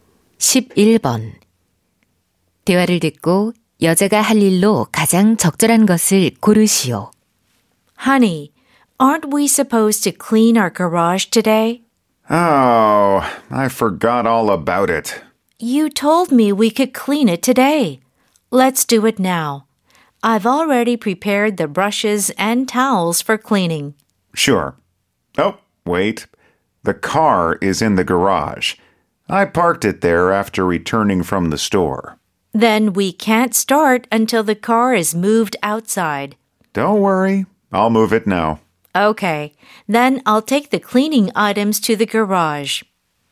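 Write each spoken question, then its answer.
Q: 대화를 듣고 여자가 할 일로 가장 적절한 것을 고르시오.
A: 청소 도구를 차고로 가져가기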